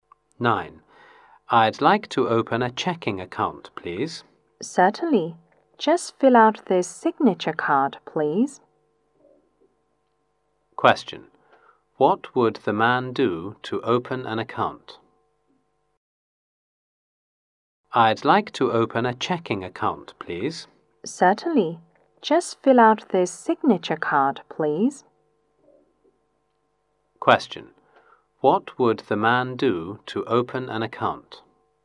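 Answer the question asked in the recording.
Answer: Fill out a signature card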